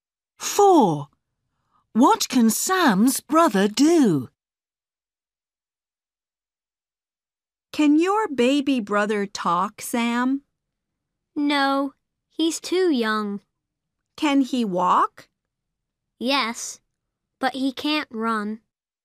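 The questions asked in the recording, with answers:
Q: What can Sam's brother do?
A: walk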